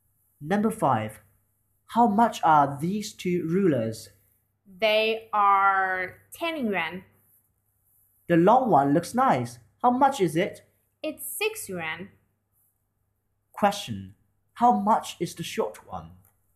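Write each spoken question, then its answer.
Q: How much is the short one?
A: 4 yuan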